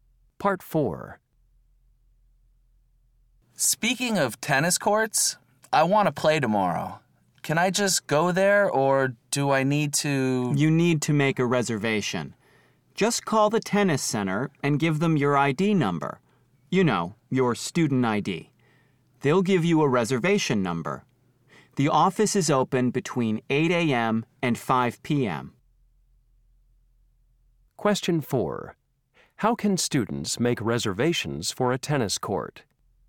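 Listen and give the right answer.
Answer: Call the tennis center and give their student ID number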